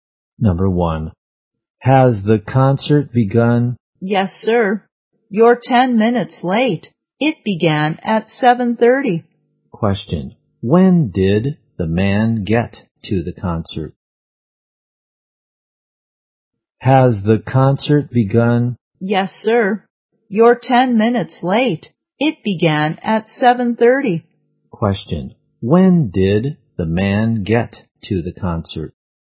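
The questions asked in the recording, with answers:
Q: When did the man get to the concert?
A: At 7:40.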